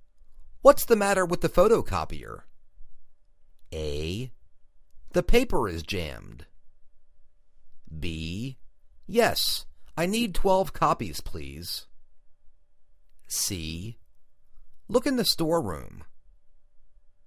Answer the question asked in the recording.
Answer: The paper is jammed